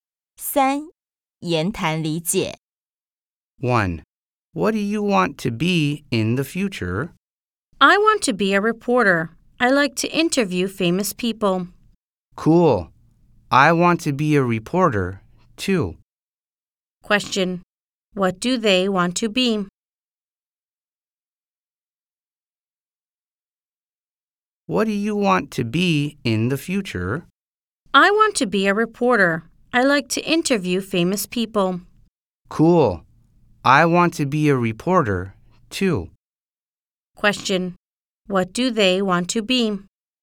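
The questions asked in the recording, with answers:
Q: Question. What do they want to be?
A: Reporters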